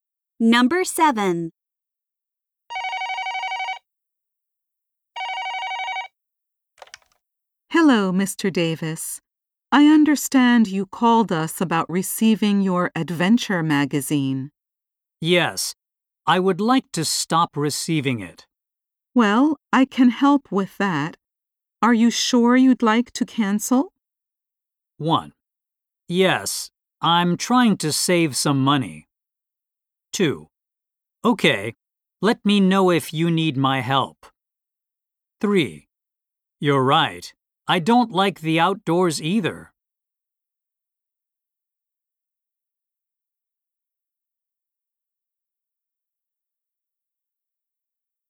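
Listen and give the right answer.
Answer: 1: Yes, I'm trying to save some money.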